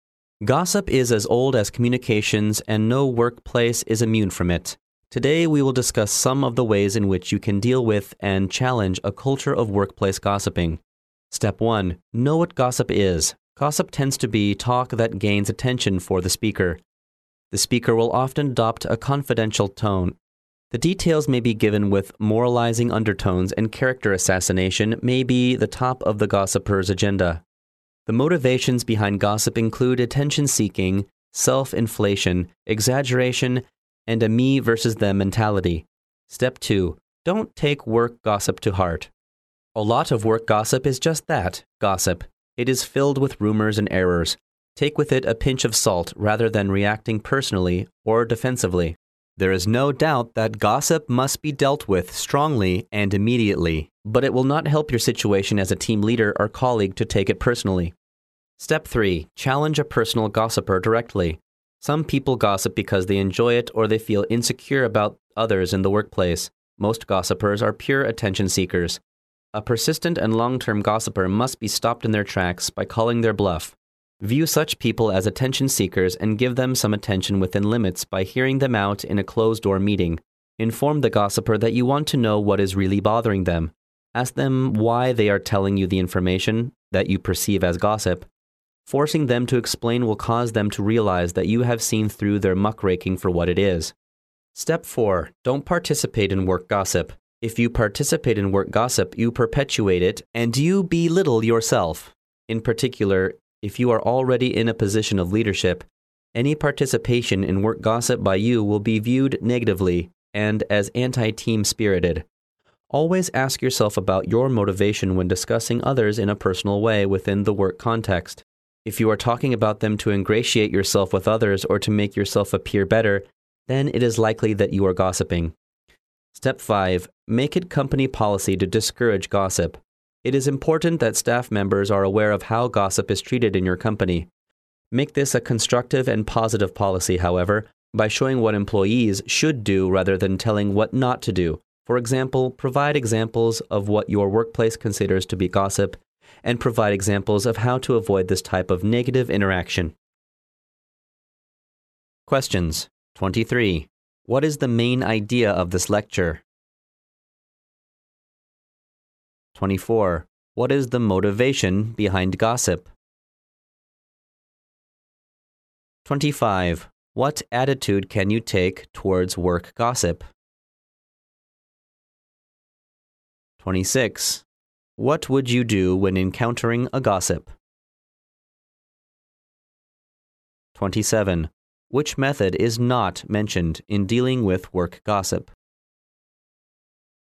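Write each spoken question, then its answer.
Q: What is the main idea of this lecture?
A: Ways to deal with and challenge workplace gossip

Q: What is the motivation behind gossip?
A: Attention-seeking, self-inflation, exaggeration, and a me-versus-them mentality

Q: What attitude can you take towards work gossip?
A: Don't take it to heart; take it with a pinch of salt

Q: What would you do when encountering a gossip?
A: Challenge them directly in a closed-door meeting and ask why they are telling you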